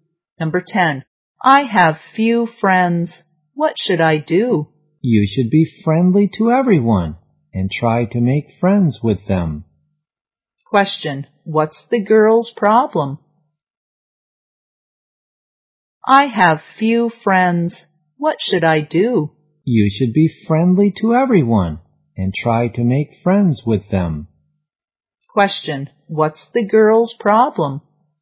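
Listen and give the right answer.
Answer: She has few friends.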